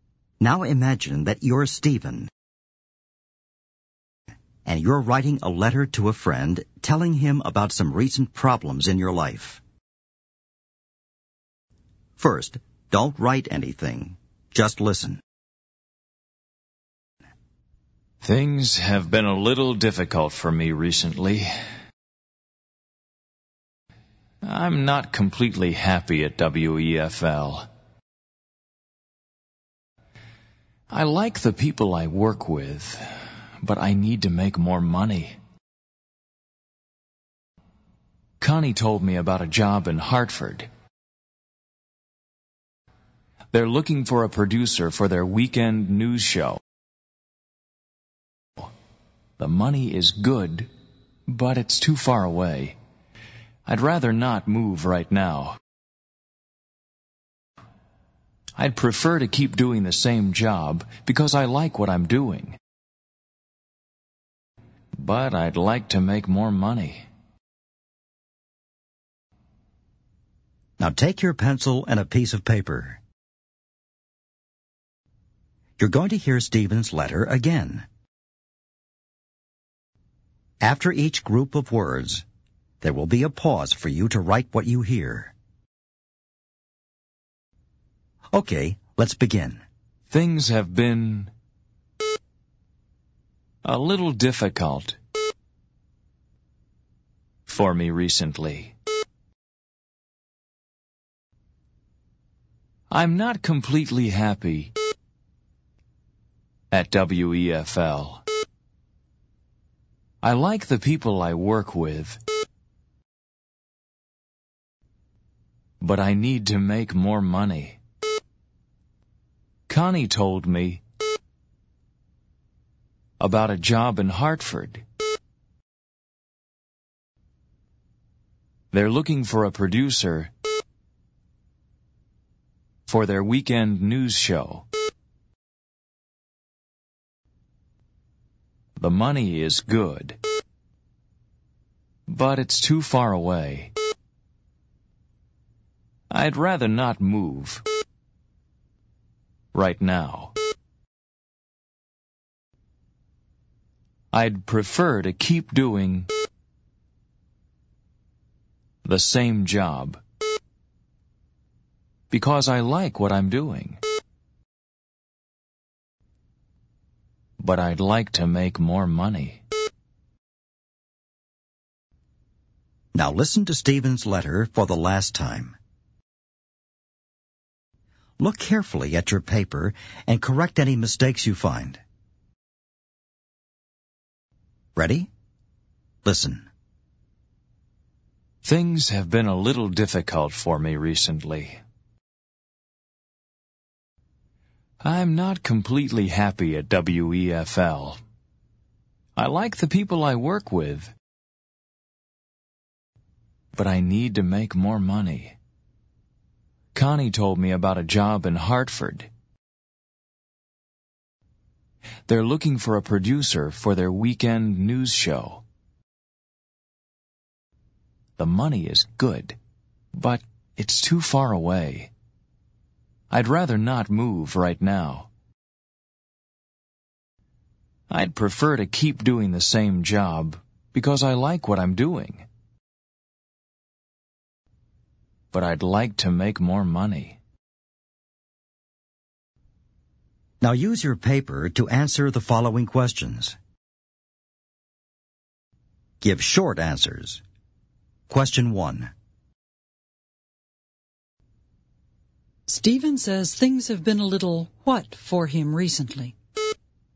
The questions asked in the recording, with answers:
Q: Stephen says things have been a little what for him recently?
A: A little difficult.